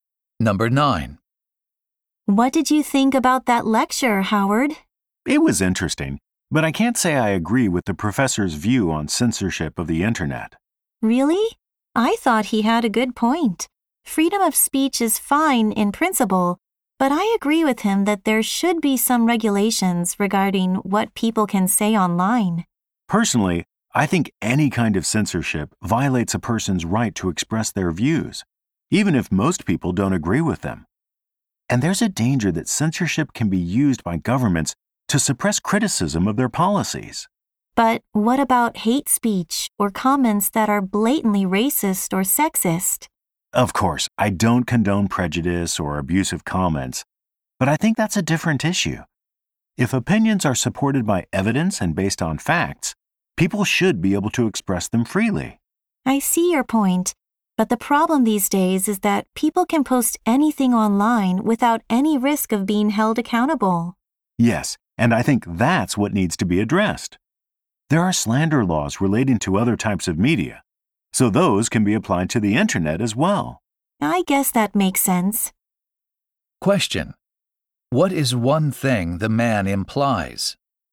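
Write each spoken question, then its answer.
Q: What is one thing the man implies?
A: Slander laws should be applied to the internet instead of censorship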